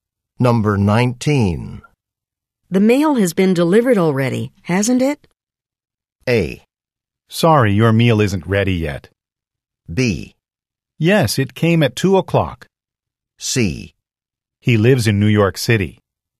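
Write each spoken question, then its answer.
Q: The mail has been delivered already, hasn't it?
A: B: Yes, it came at 2 o'clock.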